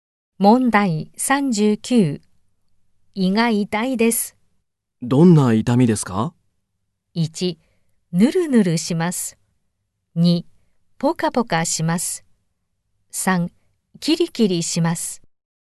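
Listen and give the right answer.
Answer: 3: キリキリします。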